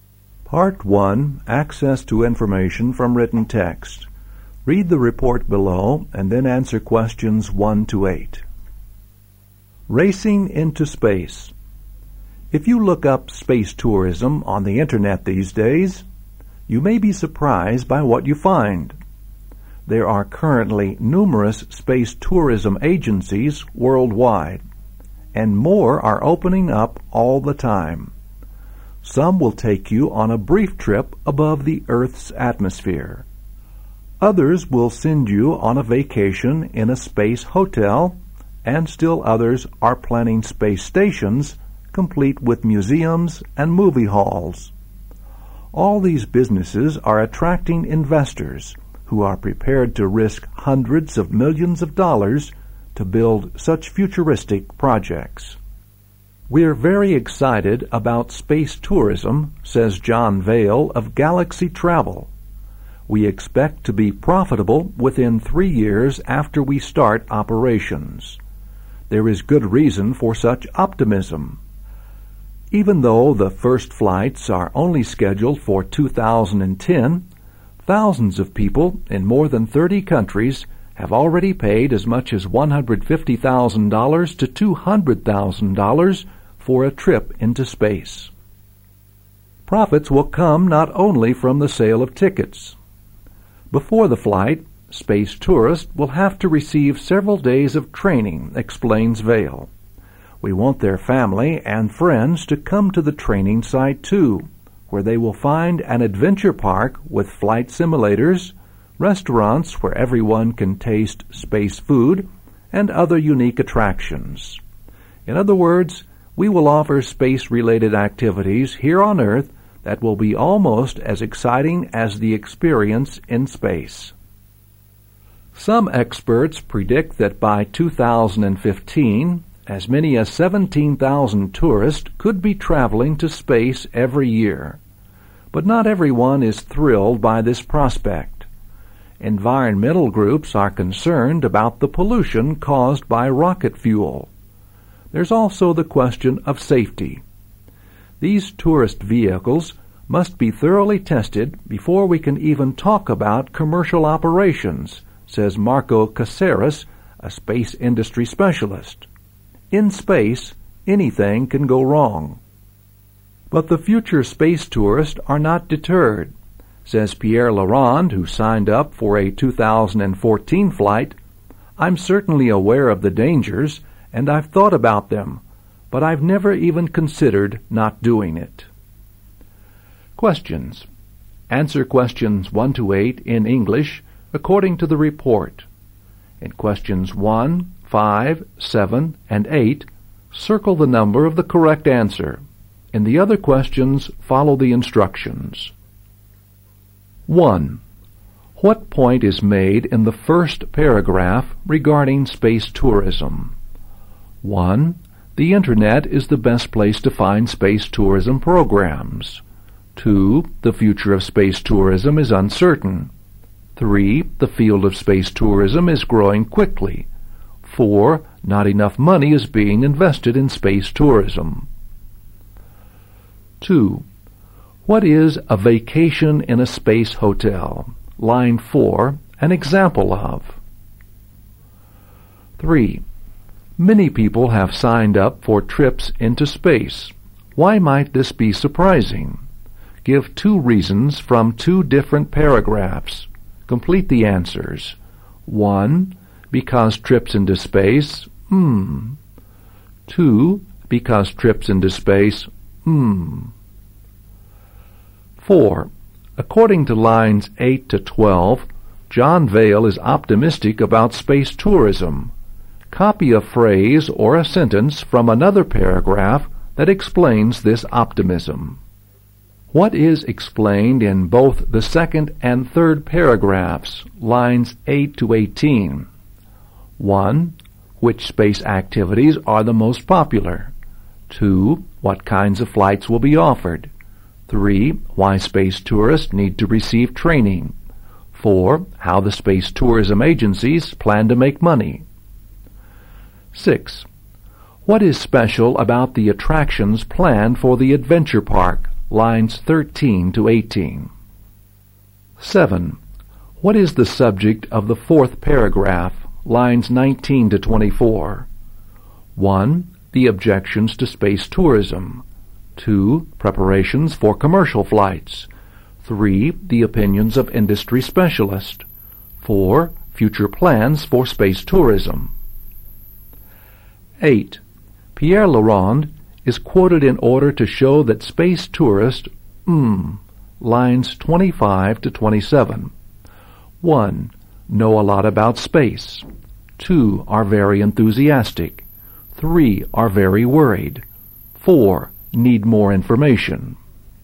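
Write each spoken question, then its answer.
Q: What point is made in the first paragraph regarding space tourism?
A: 3: The field of space tourism is growing quickly.

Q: What is a vacation in a space hotel?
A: An example of what space tourism agencies offer

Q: What is explained in both the second and third paragraphs, lines 8 to 18?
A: 4: How the space tourism agencies plan to make money

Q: What is special about the attractions planned for the adventure park?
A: They will be almost as exciting as the experience in space

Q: What is the subject of the fourth paragraph, lines 19 to 24?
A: 1: The objections to space tourism.

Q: Pierre Laurent is quoted in order to show that space tourist, lines 25 to 27.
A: 2: Are very enthusiastic.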